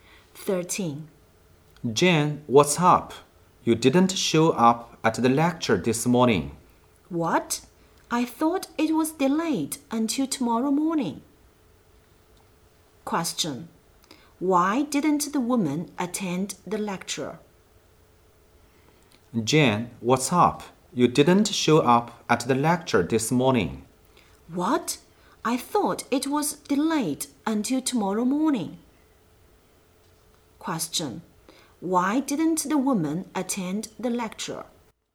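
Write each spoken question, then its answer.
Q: Why didn't the woman attend the lecture?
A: She thought it was delayed until tomorrow morning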